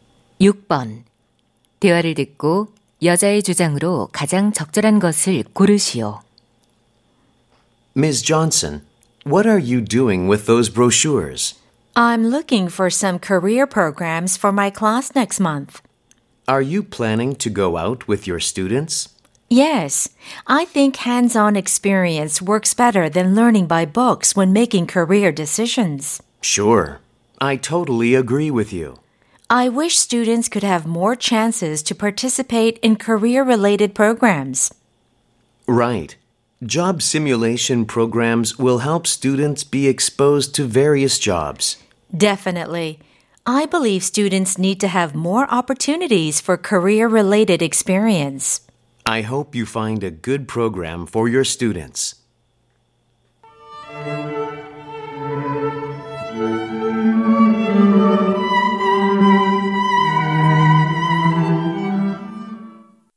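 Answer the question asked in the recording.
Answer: 학생들에게 진로 관련 체험 기회가 더 필요하다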